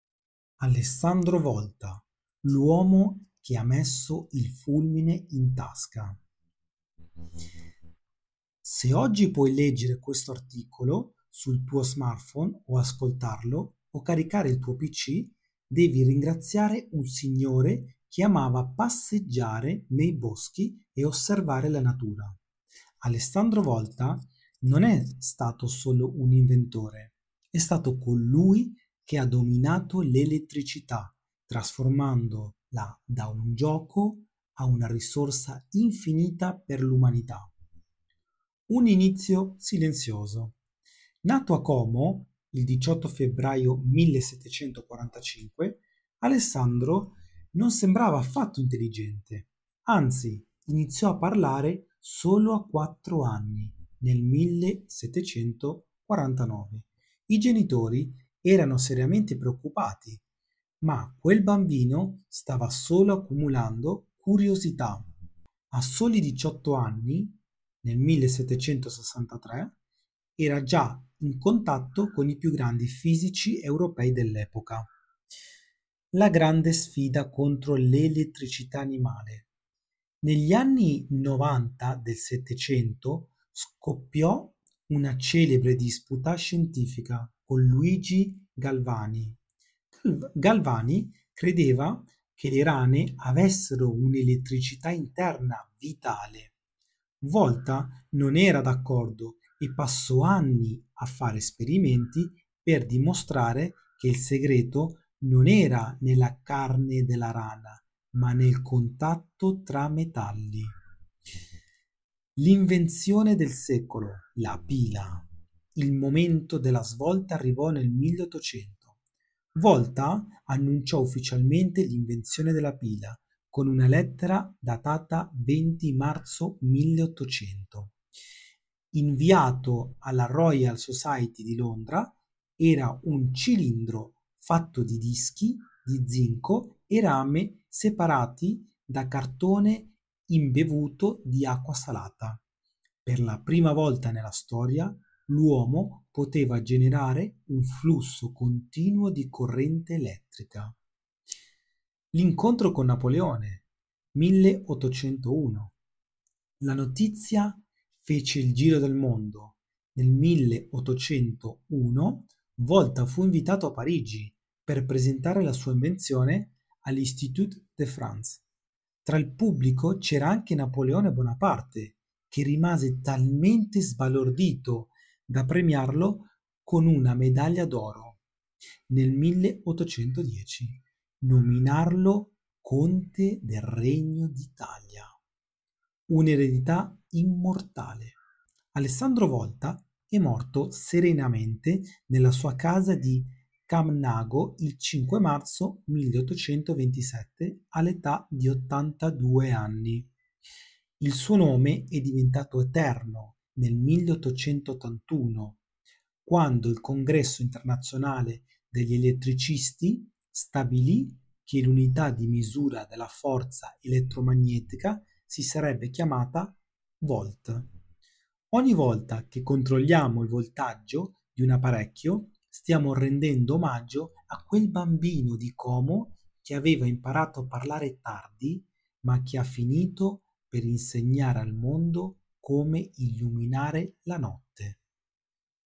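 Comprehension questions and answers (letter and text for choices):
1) In quale città è nato Alessandro Volta?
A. Roma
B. Como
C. Londra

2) A che età Alessandro Volta iniziò a parlare?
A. A due anni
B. A tre anni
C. A quattro anni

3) Con quale scienziato Volta ebbe una celebre disputa sull'elettricità?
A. Luigi Galvani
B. Isaac Newton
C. Napoleone Bonaparte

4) In cosa consisteva la teoria dell'elettricità "vitale" di Galvani?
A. L'elettricità era generata dal contatto tra metalli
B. L'elettricità era prodotta internamente dalle rane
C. L'elettricità si trovava solo nell'acqua salata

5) Quando è stata annunciata ufficialmente l'invenzione della pila?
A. Il 18 febbraio 1745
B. Il 20 marzo 1800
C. Il 5 marzo 1827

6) Com'era strutturata la pila originale di Volta?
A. Dischi di zinco e rame separati da cartone imbevuto di acqua salata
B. Un cilindro di vetro riempito di gas elettrico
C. 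Dischi di oro e argento separati da cuoio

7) Quale onorificenza ricevette Volta da Napoleone Bonaparte nel 1810?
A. La nomina a Presidente dell'Institut de France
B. Una medaglia d'oro alla Royal Society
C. Il titolo di Conte del Regno d'Italia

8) Cosa accadde nel 1881 per onorare la memoria di Volta?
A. Il "Volt" divenne l'unità di misura della forza elettromotrice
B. Fu costruita la prima centrale elettrica a Como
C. La sua casa di Camnago divenne un museo nazionale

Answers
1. B. Como
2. C. A quattro anni
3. A. Luigi Galvani
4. B. L'elettricità era prodotta internamente dalle rane
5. B. Il 20 marzo 1800
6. A. Dischi di zinco e rame separati da cartone imbevuto di acqua salata
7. C. Il titolo di Conte del Regno d'Italia
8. A. Il "Volt" divenne l'unità di misura della forza elettromotrice

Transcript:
Alessandro Volta: L'uomo che ha messo il fulmine in tasca
Se oggi puoi leggere questo articolo sul tuo smartphone o caricare il tuo pc, devi ringraziare un signore che amava passeggiare nei boschi e osservare la natura. 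Alessandro Volta non è stato solo un inventore; è stato colui che ha dominato l'elettricità, trasformandola da un gioco a una risorsa infinita per l'umanita'
Un inizio "silenzioso"
Nato a Como il 18 febbraio 1745, Alessandro non sembrava affatto intelligente. Anzi, iniziò a parlare solo a quattro anni, nel 1749. I genitori erano seriamente preoccupati, ma quel bambino stava solo accumulando curiosità: a soli 18 anni, nel 1763, era già in contatto con i più grandi fisici europei dell'epoca.
La grande sfida contro "l'elettricità animale"
Negli anni '90 del Settecento, scoppiò una celebre disputa scientifica con Luigi Galvani. Galvani credeva che le rane avessero un'elettricità interna "vitale". Volta non era d'accordo e passò anni a fare esperimenti per dimostrare che il segreto non era nella carne della rana, ma nel contatto tra metalli.
4. L'invenzione del secolo: La Pila (1800)
Il momento della svolta arrivò nel 1800. 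Volta annunciò ufficialmente l'invenzione della pila con una lettera datata 20 marzo 1800, inviata alla Royal Society di Londra. Era un cilindro fatto di dischi di zinco e rame separati da cartone imbevuto di acqua salata. Per la prima volta nella storia, l'uomo poteva generare un flusso continuo di corrente elettrica.
5. L'incontro con Napoleone (1801)
La notizia fece il giro del mondo. Nel 1801, Volta fu invitato a Parigi per presentare la sua invenzione all'Institut de France. Tra il pubblico c'era Napoleone Bonaparte, che rimase talmente sbalordito da premiarlo con una medaglia d'oro e, nel 1810, nominarlo Conte del Regno d'Italia.
Un'eredità immortale
Alessandro Volta e' morto serenamente nella sua casa di Camnago il 5 marzo 1827, all'età di 82 anni.
Il suo nome è diventato eterno nel 1881, quando il Congresso Internazionale degli Elettricisti stabilì che l'unità di misura della forza elettromotrice si sarebbe chiamata Volt. 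Ogni volta che controlliamo il voltaggio di un apparecchio, stiamo rendendo omaggio a quel bambino di Como che aveva imparato a parlare tardi, ma che ha finito per insegnare al mondo come illuminare la notte.
Alessandro Volta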